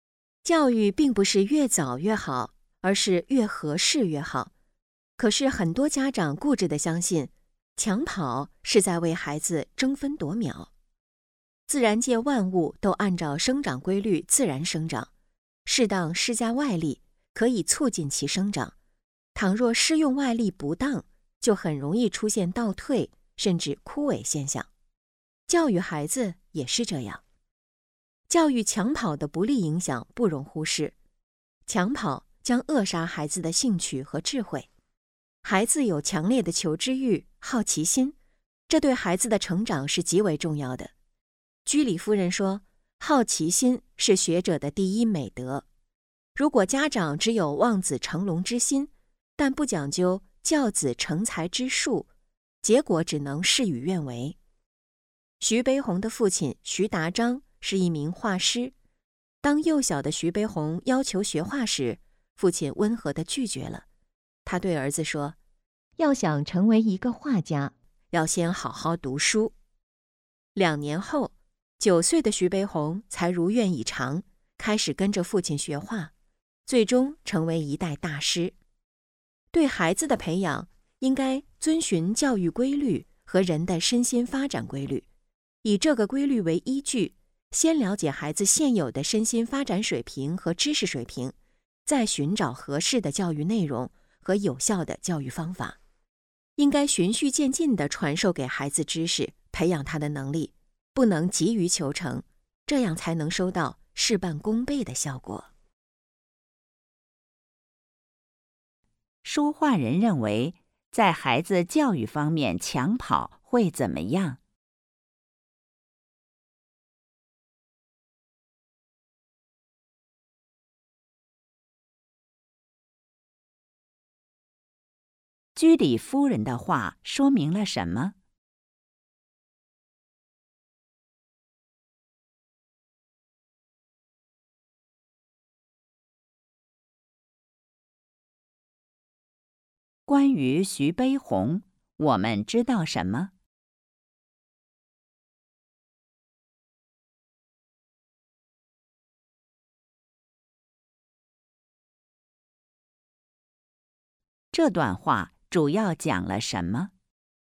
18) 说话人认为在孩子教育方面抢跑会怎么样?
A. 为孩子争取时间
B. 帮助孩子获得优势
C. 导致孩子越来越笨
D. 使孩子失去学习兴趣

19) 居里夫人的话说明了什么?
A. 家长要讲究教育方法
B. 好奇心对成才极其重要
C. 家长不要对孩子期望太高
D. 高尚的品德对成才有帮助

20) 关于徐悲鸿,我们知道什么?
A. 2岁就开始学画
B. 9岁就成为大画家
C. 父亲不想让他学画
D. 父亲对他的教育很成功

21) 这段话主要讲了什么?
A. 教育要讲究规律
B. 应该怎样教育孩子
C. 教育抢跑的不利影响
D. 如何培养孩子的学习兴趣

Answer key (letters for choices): 18D, 19B, 20D, 21A

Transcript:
可是很多家长固执地相信,抢跑是在为孩子争分夺秒。 自然界万物都按照生长规律自然生长,适当施加外力可以促进其生长,倘若施用外力不当,就很容易出现倒退甚至枯萎现象。教育孩子也是这样。 教育抢跑的不利影响不容忽视。抢跑将扼杀孩子的兴趣和智慧。孩子有强烈的求知欲、好奇心,这对孩子的成才是极为重要的。居里夫人说:"好奇心是学者的第一美德。"如果家长只有望子成龙之心,但不讲究教子成才之术,结果只能事与愿违。 徐悲鸿的父亲徐达章是一名画师,当幼小的徐悲鸿要求学画时,父亲温和地拒绝了,他对儿子说:"要想成为一个画家,先要好好读书。"两年后,9岁的徐悲鸿才如愿以偿,开始跟着父亲学画,最终成为一代大师。对孩子的培养应该遵循教育规律和人的身心发展规律,以这个规律为依据,先了解孩子现有的身心发展水平和知识水平,再寻找合适的教育内容和有效的教育方法。应该循序渐进地传授给孩子知识,培养他的能力,不能急于求成,这样才能收到事半功倍的效果。 问:说话人认为在孩子教育方面抢跑会怎么样?

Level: 三级